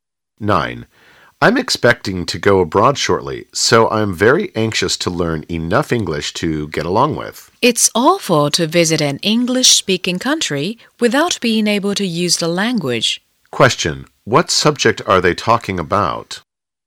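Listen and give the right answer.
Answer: Learning English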